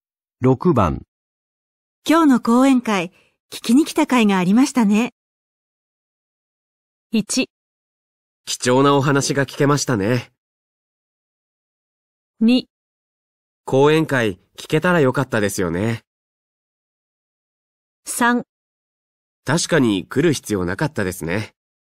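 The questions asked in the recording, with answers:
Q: 今日の講演会、聞きに来た甲斐がありましたね。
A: 1: 貴重なお話が聞けましたね。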